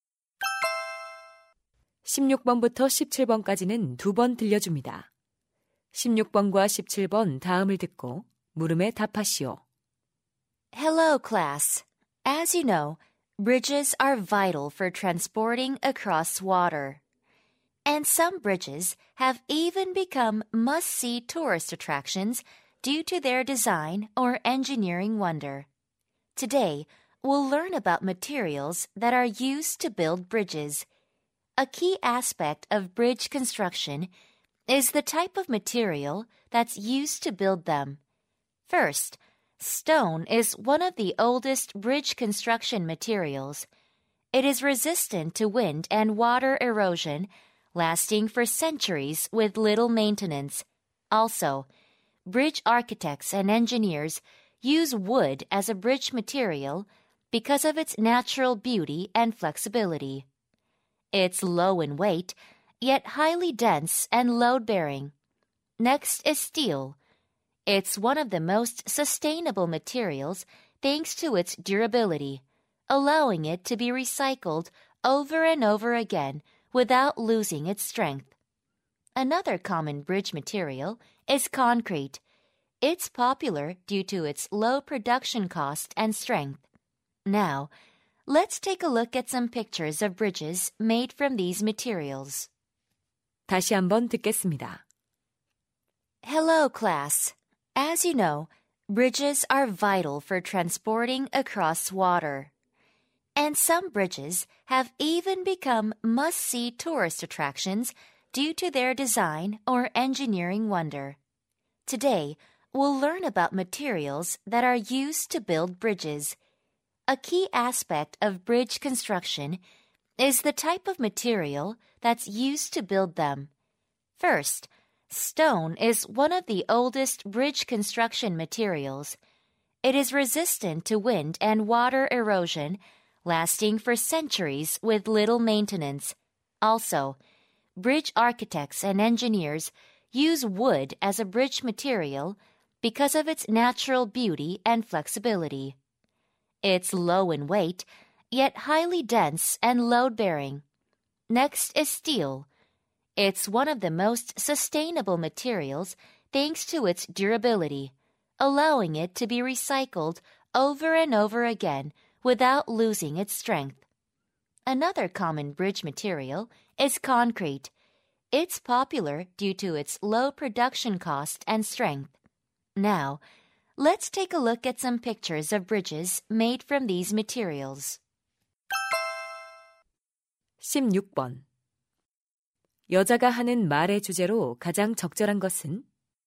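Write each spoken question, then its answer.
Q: 여자가 하는 말의 주제로 가장 적절한 것은?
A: 다리 건설에 사용되는 재료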